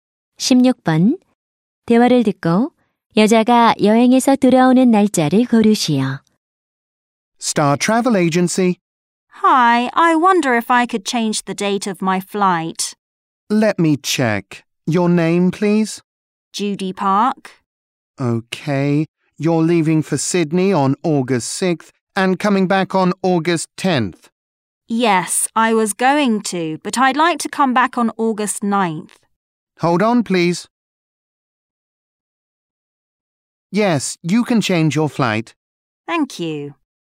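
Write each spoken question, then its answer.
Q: 16번 대화를 듣고 여자가 여행에서 돌아오는 날짜를 고르시오.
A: 8월 9일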